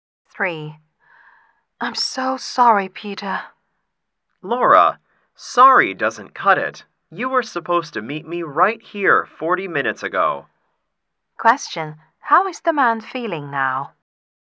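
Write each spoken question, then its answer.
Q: How is the man feeling now?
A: Angry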